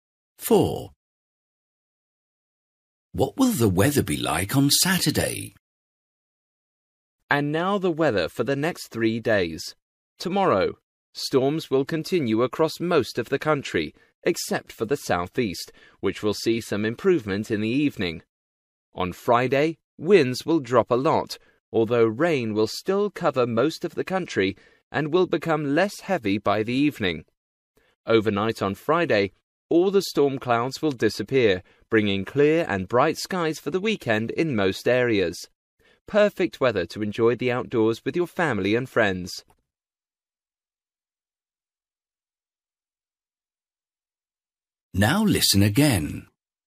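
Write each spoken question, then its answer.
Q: What will the weather be like on Saturday?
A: Clear and bright (sunny)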